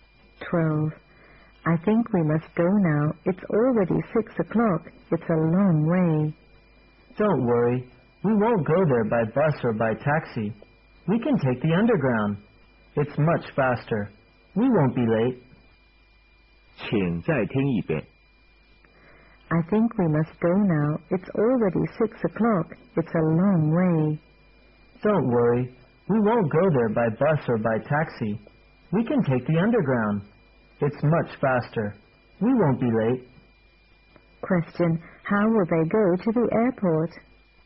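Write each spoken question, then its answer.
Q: Question. How will they go to the airport?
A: By underground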